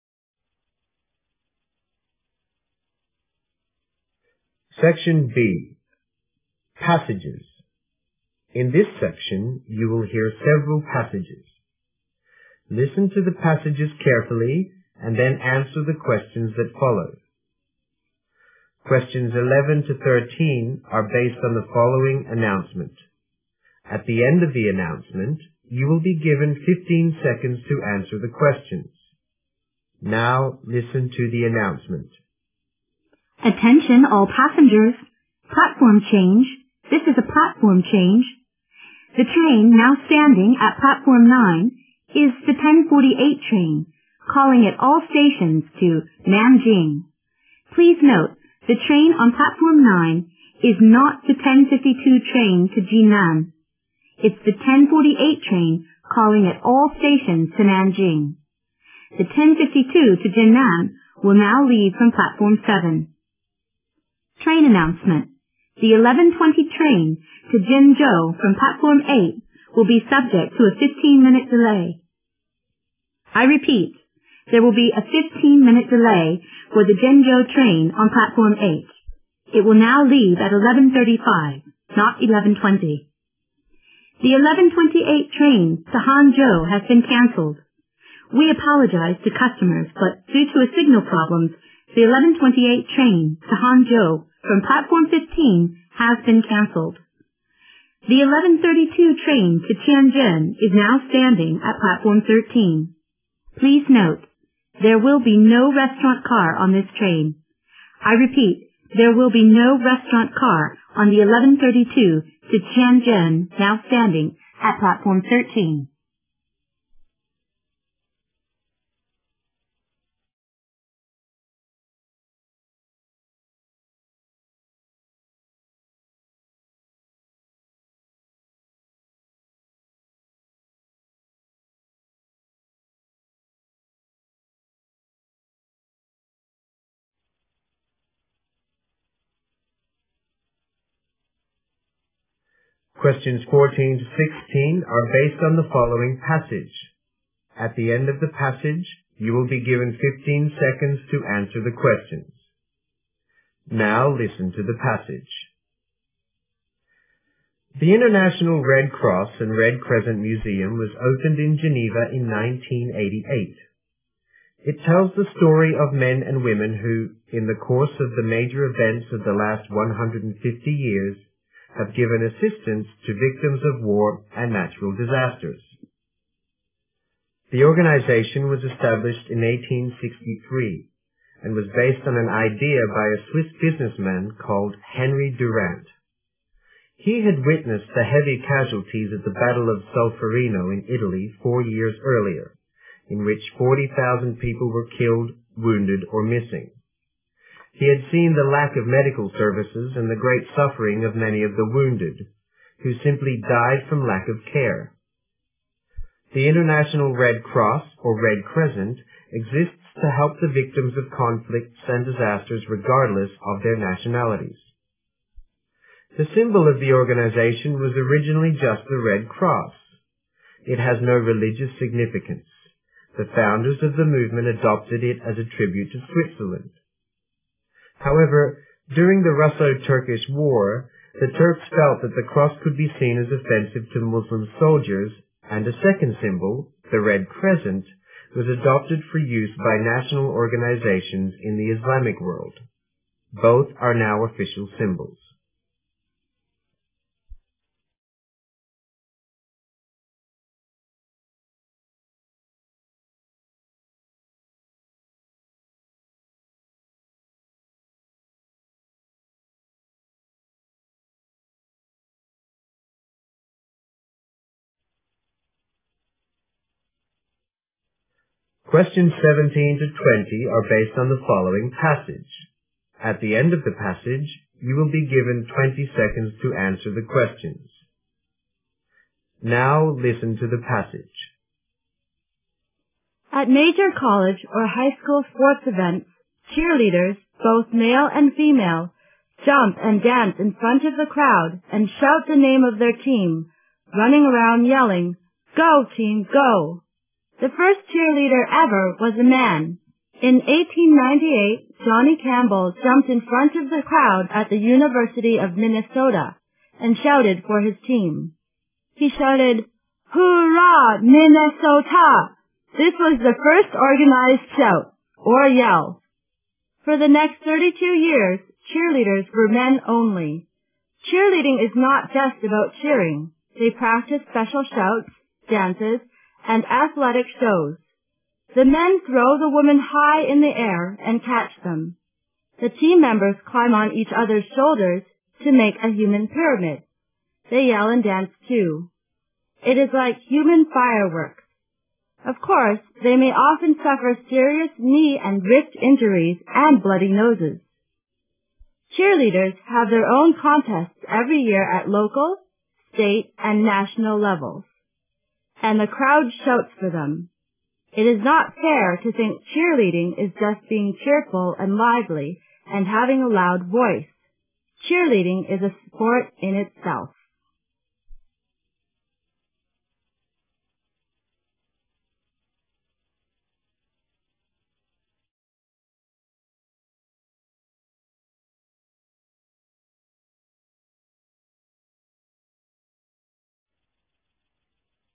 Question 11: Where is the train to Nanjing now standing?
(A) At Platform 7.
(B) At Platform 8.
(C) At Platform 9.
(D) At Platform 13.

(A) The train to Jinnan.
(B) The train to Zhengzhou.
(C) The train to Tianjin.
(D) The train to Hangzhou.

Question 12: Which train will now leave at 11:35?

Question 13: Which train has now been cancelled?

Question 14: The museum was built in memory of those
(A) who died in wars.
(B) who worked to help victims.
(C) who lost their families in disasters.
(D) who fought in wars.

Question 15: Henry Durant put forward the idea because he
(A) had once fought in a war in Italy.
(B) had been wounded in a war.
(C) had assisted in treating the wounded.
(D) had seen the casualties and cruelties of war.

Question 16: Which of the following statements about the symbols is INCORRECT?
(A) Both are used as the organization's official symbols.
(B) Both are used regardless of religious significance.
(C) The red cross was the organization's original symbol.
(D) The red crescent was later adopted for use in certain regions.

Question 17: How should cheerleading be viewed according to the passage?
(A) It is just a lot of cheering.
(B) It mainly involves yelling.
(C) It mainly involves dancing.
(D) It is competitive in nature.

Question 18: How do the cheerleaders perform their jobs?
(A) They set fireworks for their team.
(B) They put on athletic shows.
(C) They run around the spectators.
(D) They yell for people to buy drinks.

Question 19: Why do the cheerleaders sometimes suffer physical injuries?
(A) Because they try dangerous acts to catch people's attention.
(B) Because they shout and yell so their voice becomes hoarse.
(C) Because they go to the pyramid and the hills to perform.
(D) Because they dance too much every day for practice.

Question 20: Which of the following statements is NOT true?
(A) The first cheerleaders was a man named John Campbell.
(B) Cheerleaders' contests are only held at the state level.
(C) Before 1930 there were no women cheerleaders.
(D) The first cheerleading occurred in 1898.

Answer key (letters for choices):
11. C
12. B
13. D
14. B
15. D
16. B
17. D
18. B
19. A
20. B

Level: GRADE FOUR